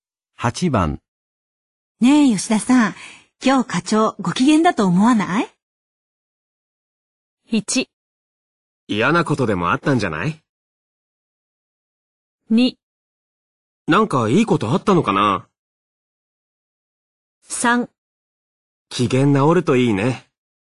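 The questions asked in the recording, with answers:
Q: ねえ、吉田さん。今日課長、ご機嫌だと思わない?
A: 2: なんかいいことあったのかな?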